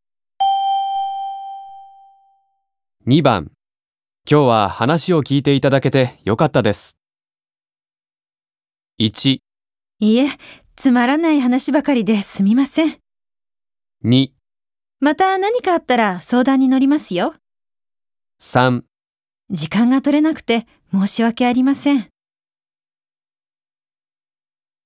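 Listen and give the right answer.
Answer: 2: また何かあったら相談に乗りますよ。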